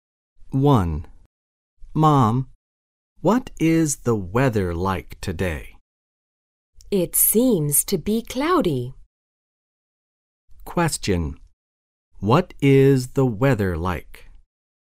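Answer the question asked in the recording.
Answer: Cloudy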